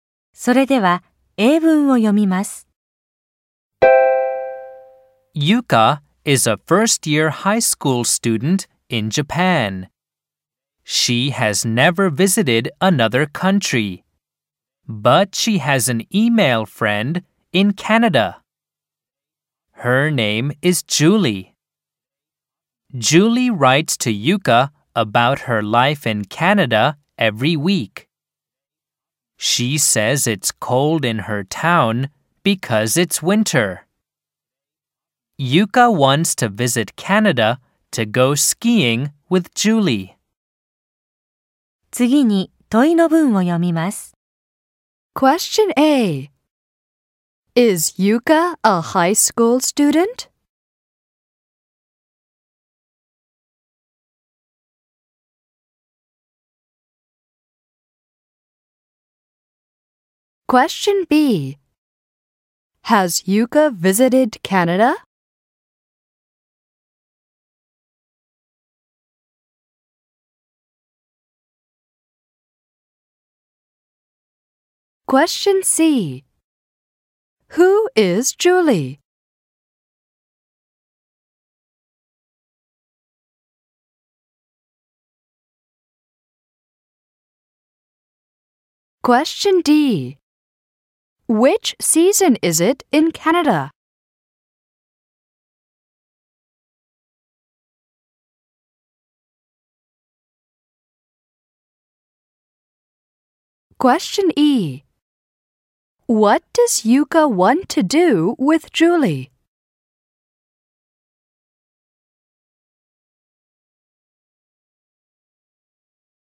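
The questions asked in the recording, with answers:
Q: Is Yuka a high school student?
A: Yes, she is.

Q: Has Yuka visited Canada?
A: No, she hasn't.

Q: Who is Julie?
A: Yuka's email friend in Canada

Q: Which season is it in Canada?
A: Winter

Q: What does Yuka want to do with Julie?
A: Go skiing in Canada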